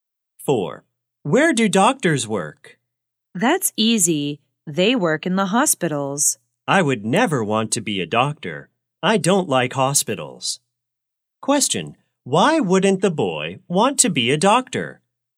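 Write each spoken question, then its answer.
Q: Why wouldn't the boy want to be a doctor?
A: He doesn't like hospitals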